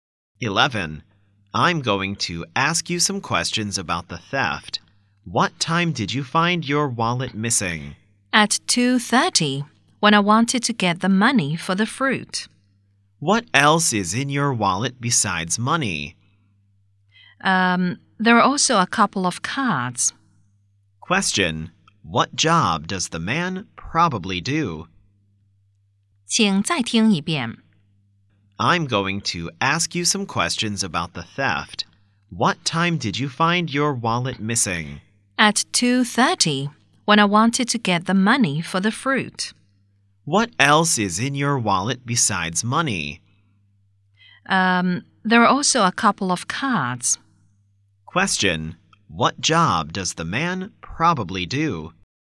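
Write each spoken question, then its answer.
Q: Question: What job does the man probably do?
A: A policeman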